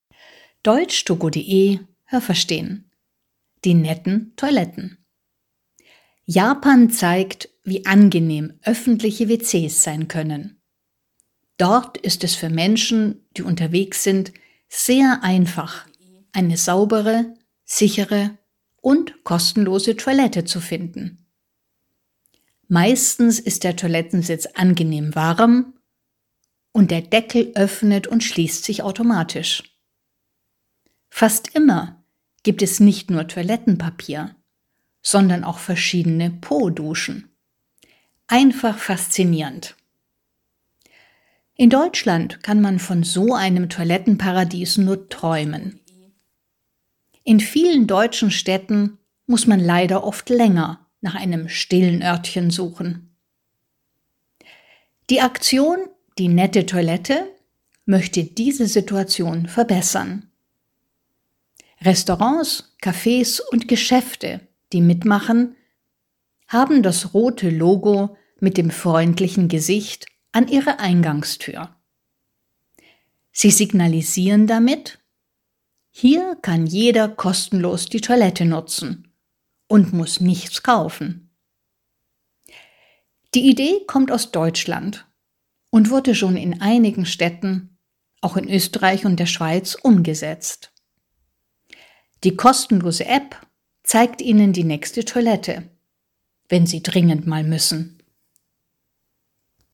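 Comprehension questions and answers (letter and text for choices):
Was haben Sie gehört? Es gibt nur eine korrekte Antwort.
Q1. In Japan gibt es ...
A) sehr viele einfache Toiletten, die nur wenig kosten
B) sehr viele öffentliche Toiletten, die sehr sauber sind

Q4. In deutschen Städten ...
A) findet man immer sehr schnell ein öffentliches WC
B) gibt es nicht so viele öffentliche WCs wie in Japan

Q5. Bei der Aktion „Die nette Toilette" können _____ mitmachen.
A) alle Deutschen, die eine Toilette haben,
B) Geschäfte und Restaurants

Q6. Das Logo der Aktion „Die nette Toilette" ...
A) zeigt ein freundliches Gesicht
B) zeigt ein rotes Licht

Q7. Wenn man dieses Logo an der Tür eines Restaurants sieht, dann ...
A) kann man dort die Toilette benutzen, muss aber etwas essen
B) kann man dort die Toilette benutzen und muss nichts bestellen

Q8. „Die nette Toilette" gibt es _____ in Deutschland, Österreich und der Schweiz.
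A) in allen Städten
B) in einigen Städten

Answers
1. B) sehr viele öffentliche Toiletten, die sehr sauber sind
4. B) gibt es nicht so viele öffentliche WCs wie in Japan
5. B) Geschäfte und Restaurants
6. A) zeigt ein freundliches Gesicht
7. B) kann man dort die Toilette benutzen und muss nichts bestellen
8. B) in einigen Städten

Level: A2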